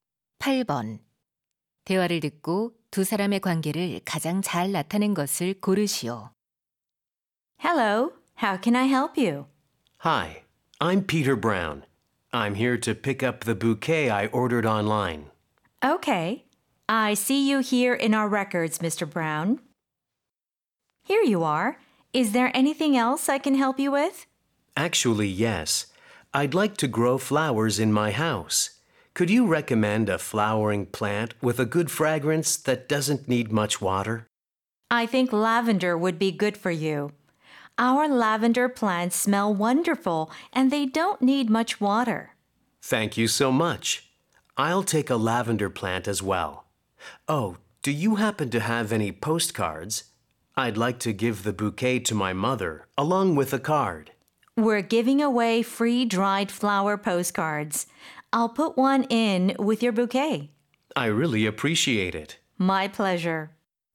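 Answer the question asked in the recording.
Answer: 꽃집 직원과 손님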